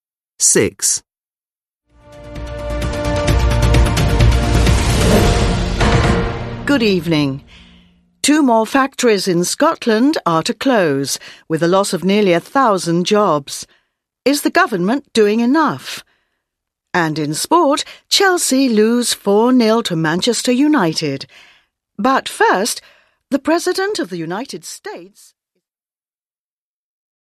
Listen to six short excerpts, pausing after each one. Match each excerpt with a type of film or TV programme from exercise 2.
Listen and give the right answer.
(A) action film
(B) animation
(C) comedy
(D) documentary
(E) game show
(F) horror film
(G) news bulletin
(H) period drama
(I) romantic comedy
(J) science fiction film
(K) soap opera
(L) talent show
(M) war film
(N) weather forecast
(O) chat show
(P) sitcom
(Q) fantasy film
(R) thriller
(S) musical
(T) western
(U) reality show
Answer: (G) news bulletin

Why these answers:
Good evening. Two more factories in Scotland are to close, with the loss of nearly a thousand jobs. Is the government doing enough? And in sport, Chelsea lose four-nil to Manchester United. But first, the president of the United States ...

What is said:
6. Good evening. Two more factories in Scotland are to close, with the loss of nearly a thousand jobs. Is the government doing enough? And in sport, Chelsea lose four-nil to Manchester United. But first, the president of the United States ...

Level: Lớp 10